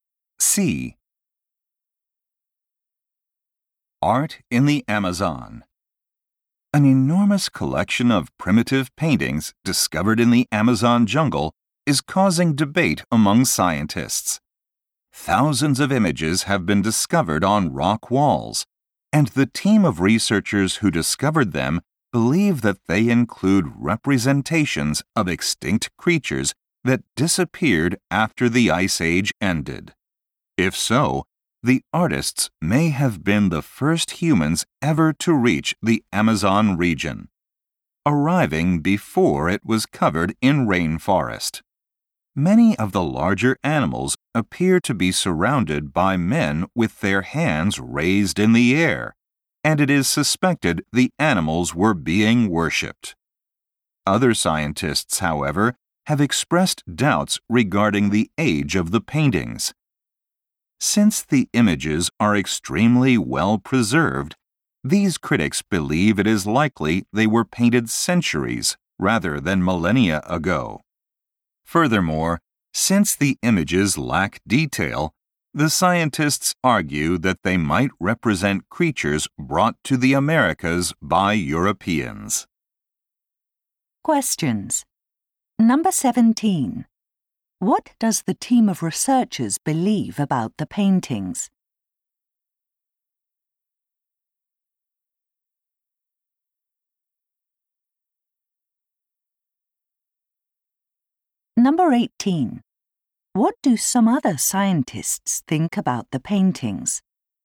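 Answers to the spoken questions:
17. They show extinct Ice Age creatures, so the artists may have been the first humans in the Amazon.
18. They were painted centuries, not millennia, ago.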